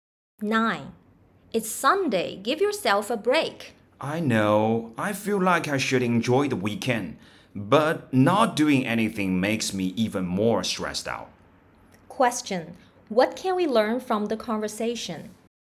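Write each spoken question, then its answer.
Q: What can we learn from the conversation?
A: The woman finds it hard to relax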